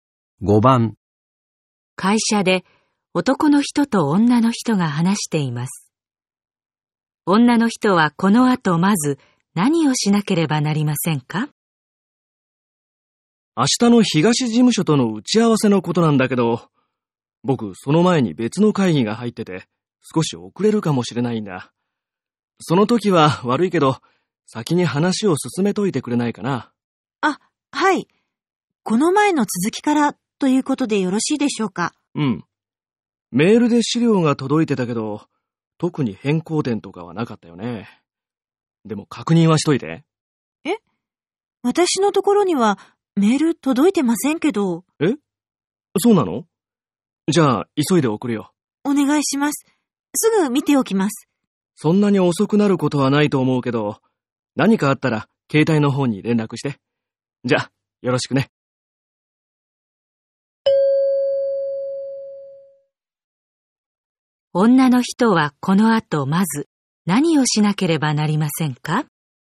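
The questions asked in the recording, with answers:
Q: 女の人はこの後まず何をしなければなりませんか?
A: メールで届く資料を確認する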